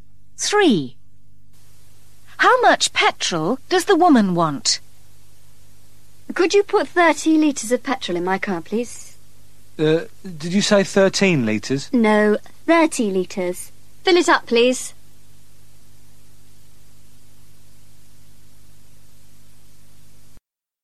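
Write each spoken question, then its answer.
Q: How much petrol does the woman want?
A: 30 litres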